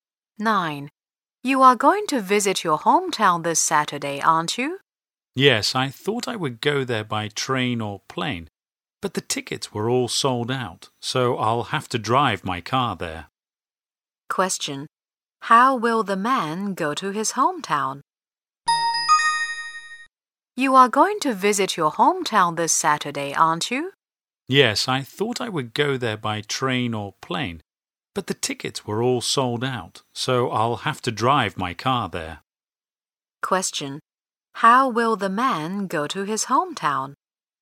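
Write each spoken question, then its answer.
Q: How will the man go to his hometown?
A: By car (he will drive).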